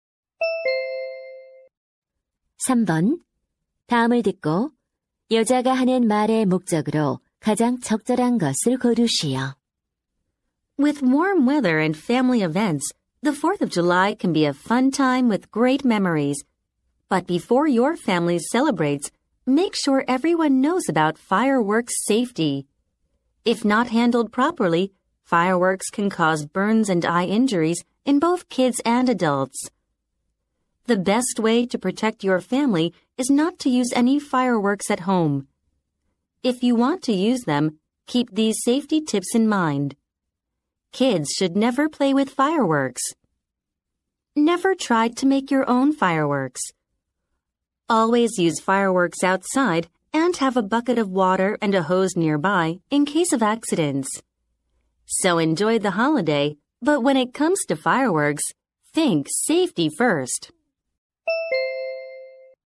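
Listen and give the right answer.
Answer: 불꽃놀이 안전 수칙을 알려 주려고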